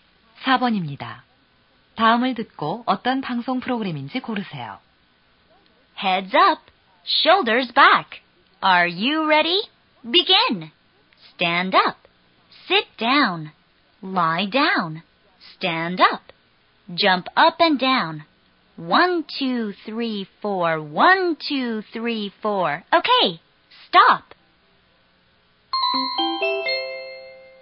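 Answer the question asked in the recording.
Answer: 체조(운동) 프로그램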